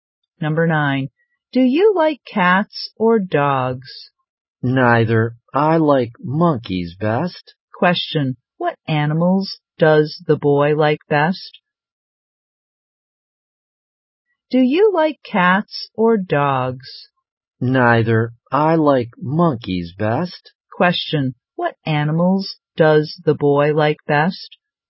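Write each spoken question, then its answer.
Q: What animals does the boy like best?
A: Monkeys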